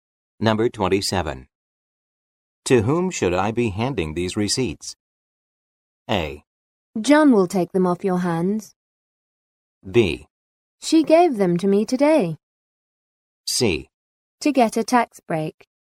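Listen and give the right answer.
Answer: A: John will take them off your hands.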